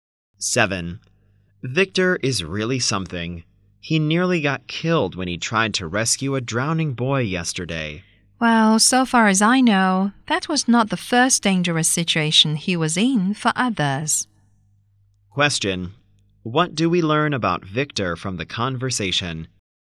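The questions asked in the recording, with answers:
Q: What do we learn about Victor from the conversation?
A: He has often risked his life to help others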